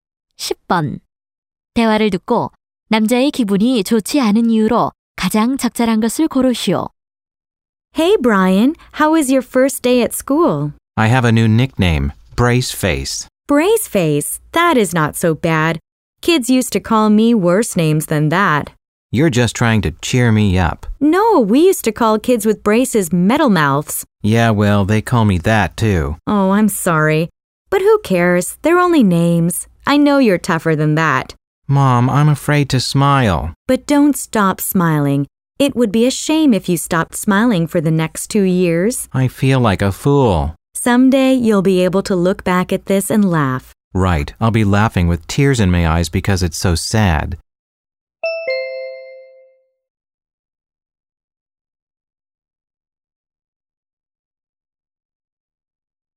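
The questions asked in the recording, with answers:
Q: 대화를 듣고 남자의 기분이 좋지 않은 이유로 가장 적절한 것을 고르시오.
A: 치아 교정기 때문에 놀림을 받아서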